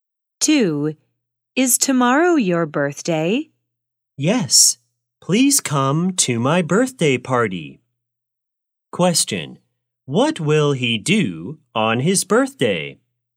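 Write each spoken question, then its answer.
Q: What will he do on his birthday?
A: Have a birthday party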